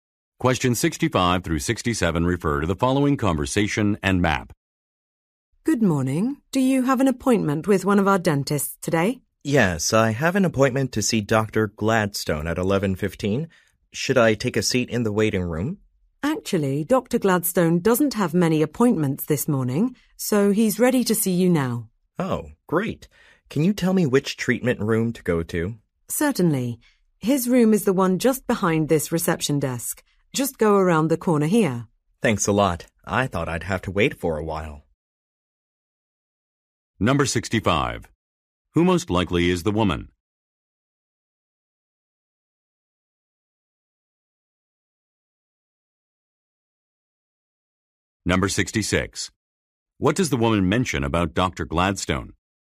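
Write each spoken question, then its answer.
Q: Who most likely is the woman?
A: A receptionist at a dental office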